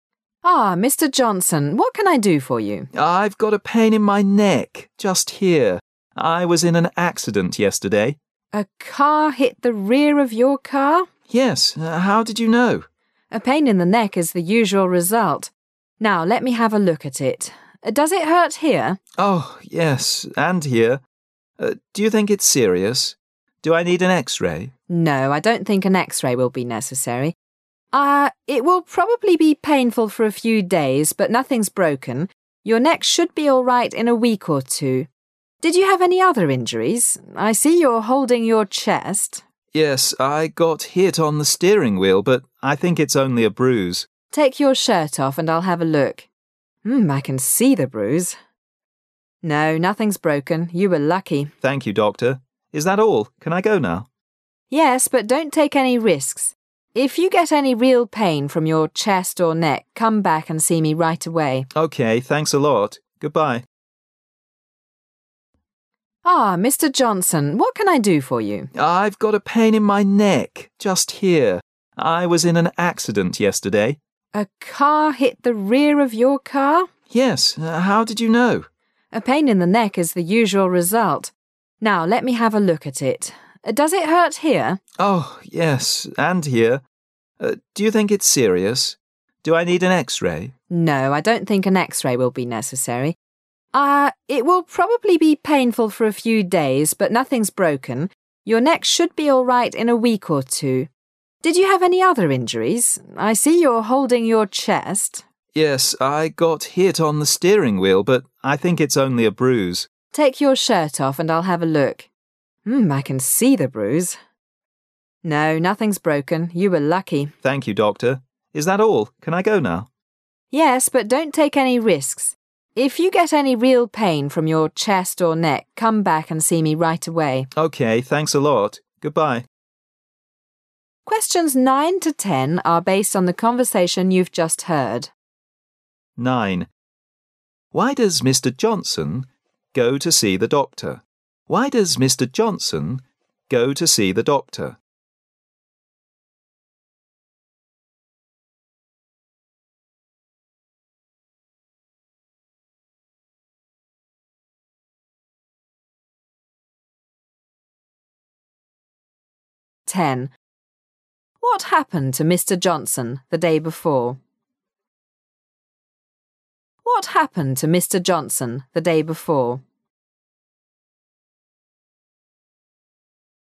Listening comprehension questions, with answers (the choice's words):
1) What happened to Mr. Johnson the day before?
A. He was hit by a truck.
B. A car hit his car from behind.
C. He hit his leg in the steering wheel.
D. He braised his back.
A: A car hit his car from behind.

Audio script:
[解析] 9-10 M: Ah, Mr. Johnson, what can I do for you? W: I've got a pain in my neck just here. I was in an accident yesterday. M: A car hit the rear of your car? W: Yes, how did you know? M: A pain in the neck is the usual result. Now let me have a look at it. Does it hurt here? W: Oh! Yes, and here. Do you think it's serious? Do I need an X-ray? M: No, I don't think an X-ray will be necessary. It will probably be painful for a few days but nothing is broken. Your neck should be all right in a week or two. Did you have any other injuries? I see you're holding your chest. W: Yes. I got it hit on the steering wheel but I think it's only a bruise. M: Take your shirt off and I'll, have a look. I can see the bruise. No, nothing's broken. You were lucky. W: Thank .you, doctor. Is that all? Can I go now? M: Yes, but don't take any risks. If you get any real pain from your chest or neck, come back and see me right away. W: OK. Thanks a lot. Goodbye. 9.Why does Mr. Johnson go to see the doctor?